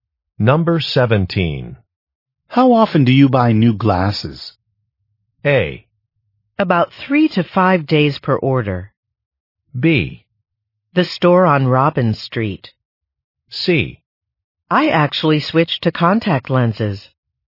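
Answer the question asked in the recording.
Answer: C: I actually switched to contact lenses.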